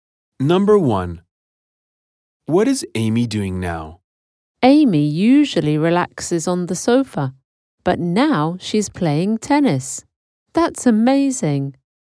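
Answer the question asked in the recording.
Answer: Playing tennis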